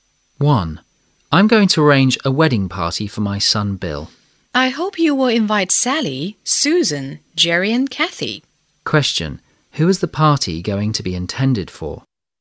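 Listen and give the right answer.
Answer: The man's son Bill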